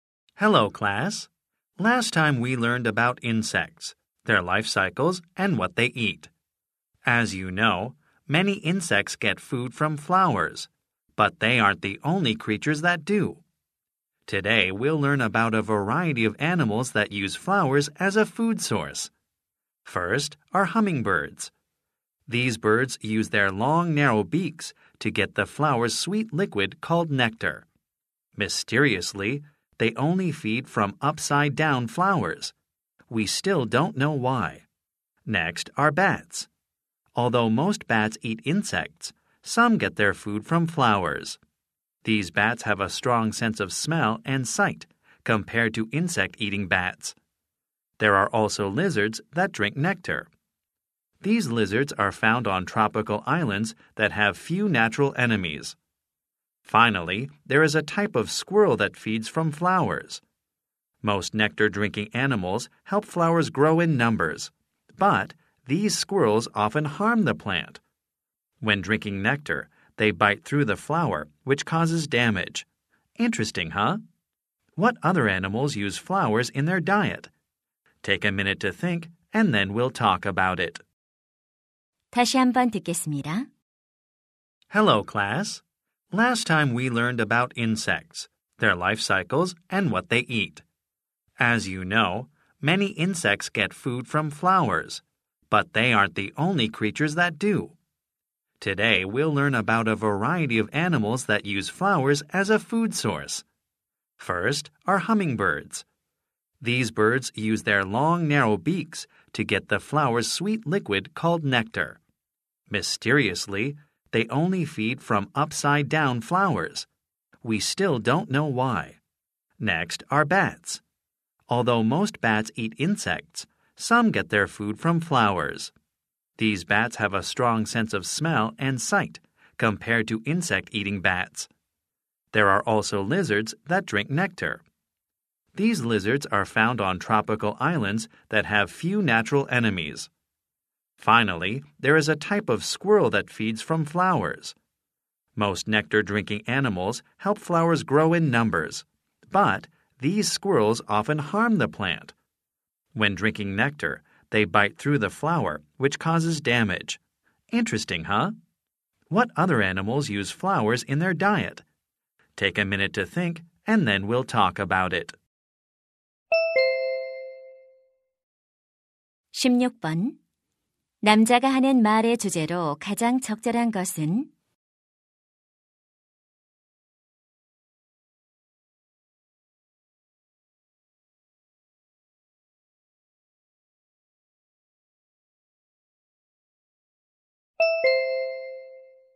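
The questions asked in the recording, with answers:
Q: 남자가 하는 말의 주제로 가장 적절한 것은?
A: 꽃을 먹이로 이용하는 다양한 동물들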